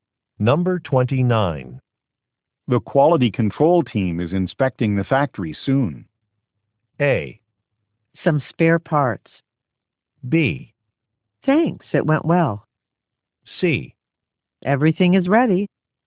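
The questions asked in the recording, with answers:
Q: The quality control team is inspecting the factory soon.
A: C: Everything is ready.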